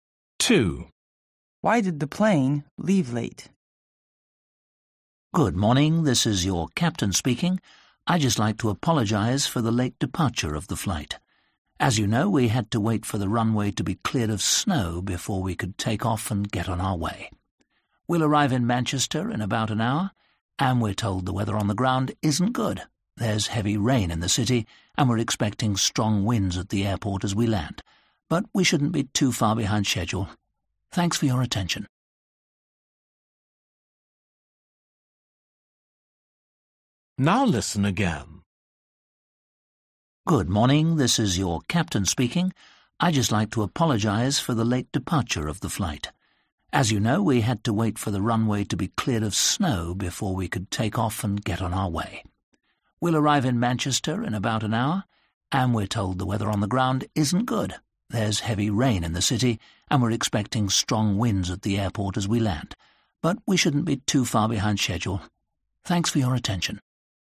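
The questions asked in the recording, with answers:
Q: Why did the plane leave late?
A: because of snow on the runway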